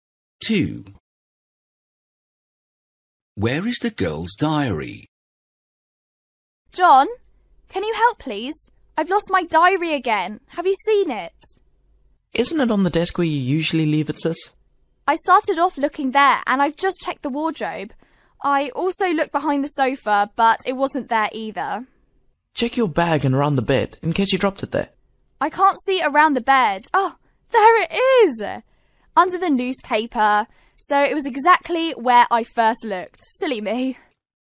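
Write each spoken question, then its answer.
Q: Where is the girl's diary?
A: On the desk, under the newspaper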